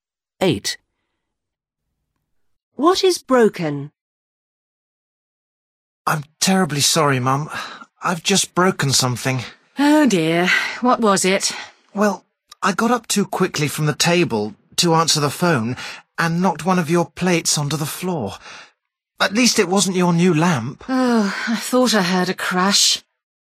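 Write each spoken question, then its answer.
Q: What is broken?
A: A plate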